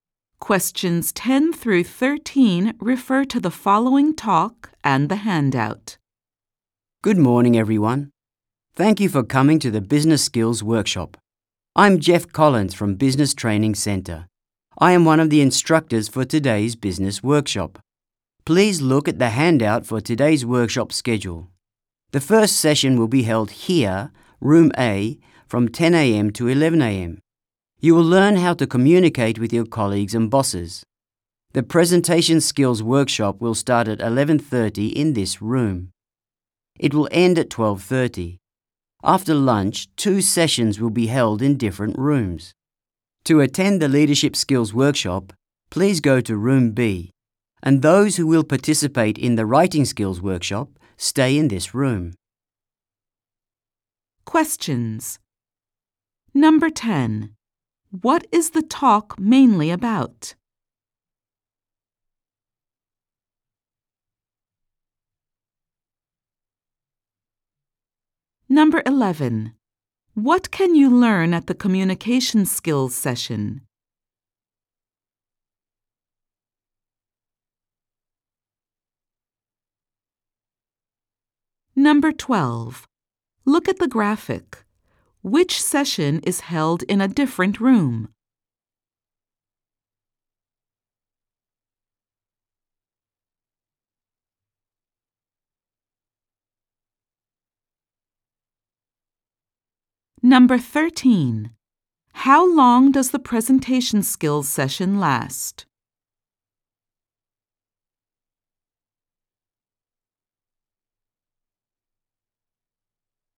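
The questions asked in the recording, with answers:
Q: What is the talk mainly about?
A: The schedule for the Business Skills Workshop

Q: What can you learn at the communication skills session?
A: How to communicate with colleagues and bosses

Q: How long does the presentation skills session last?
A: One hour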